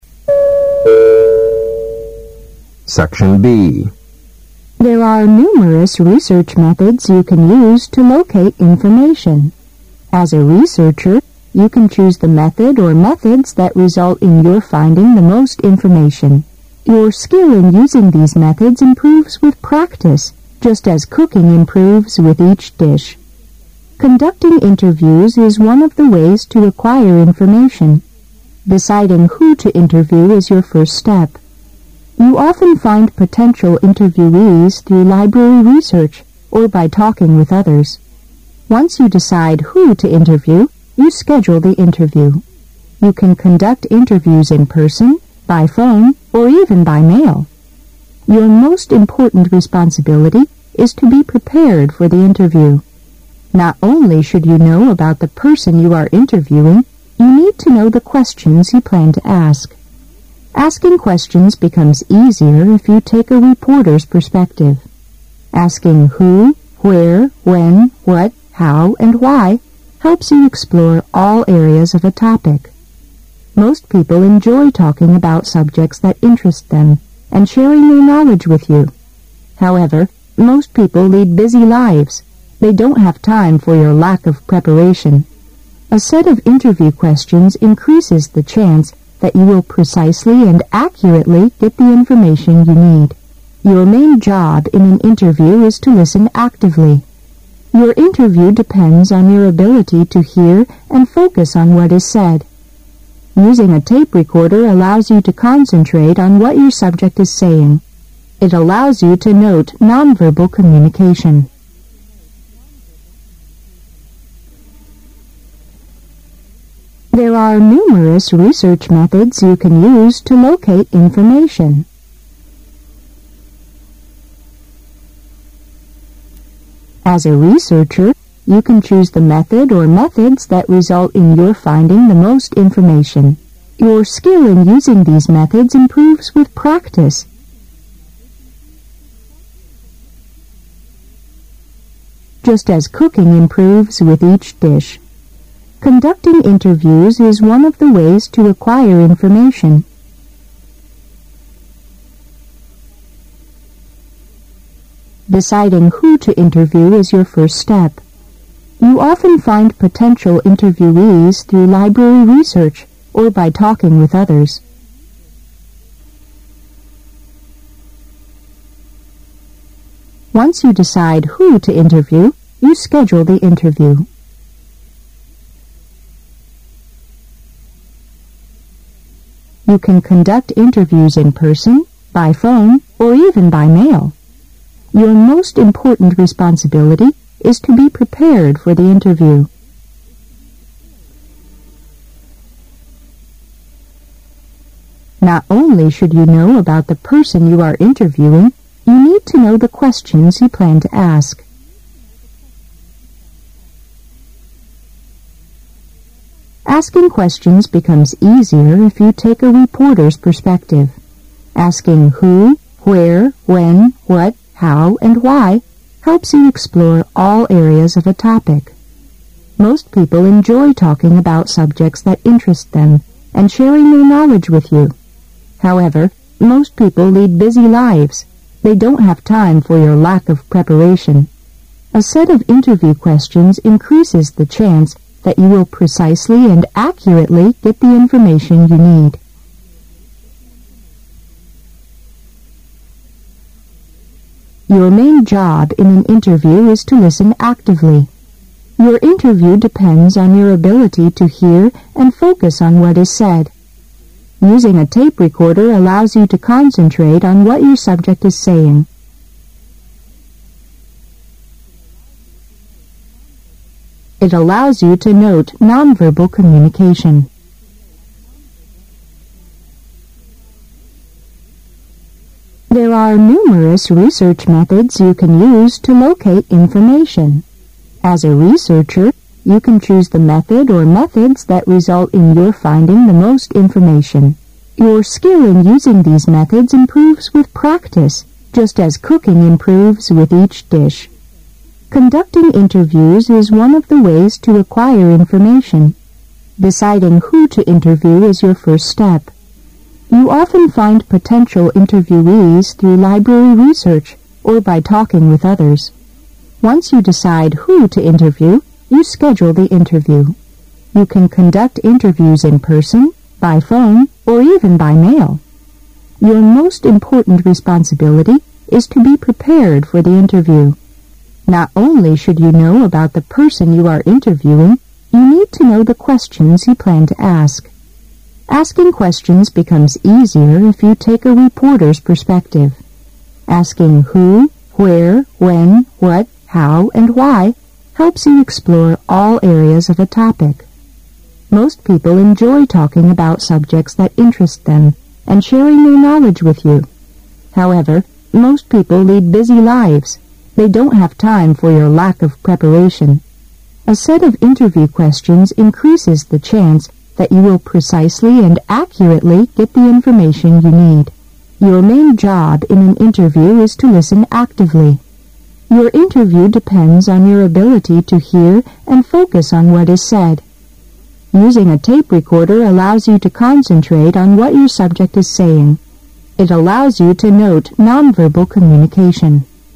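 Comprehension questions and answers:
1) There are (S1) ______ research methods you can use to (S2) ______ information.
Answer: numerous

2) There are (S1) ______ research methods you can use to (S2) ______ information.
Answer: locate

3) Your skill in using these methods improves with (S3) ______, just as cooking improves with each dish.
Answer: practice

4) (S4)______ interviews is one of the ways to acquire information.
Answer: Conducting

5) You often find (S5) ______ interviewees through l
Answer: potential

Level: 大学四级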